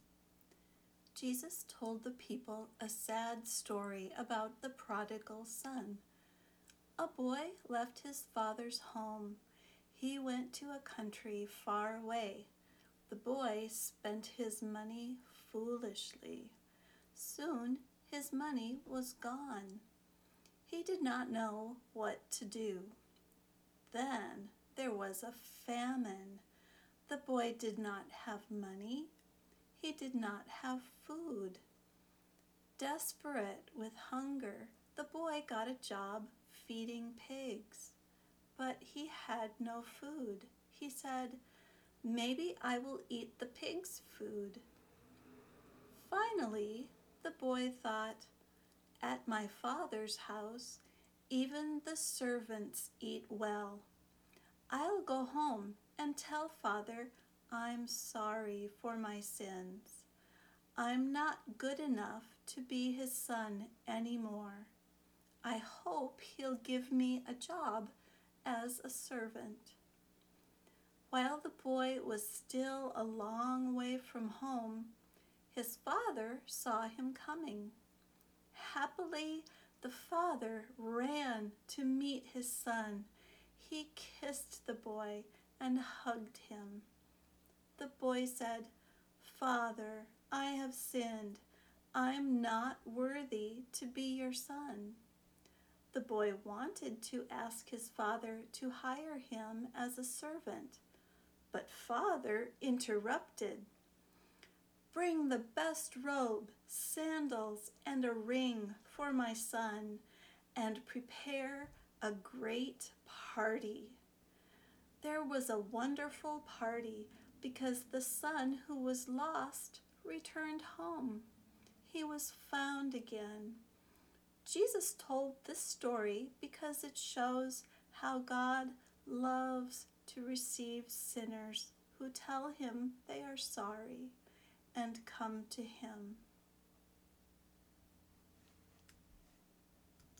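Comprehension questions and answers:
First, be prepared to find the answers to these four questions as you listen:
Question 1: Where did the boy go when he left his father's house?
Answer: To a country far away

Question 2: What was the first thing he did in this new place?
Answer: He spent his money foolishly

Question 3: When he returned home, what did he tell his father?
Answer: Father, I have sinned. I'm not worthy to be your son.

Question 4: What did his father do?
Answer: He ran to meet him, kissed and hugged him, gave him the best robe, sandals and a ring, and prepared a great party

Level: Beginner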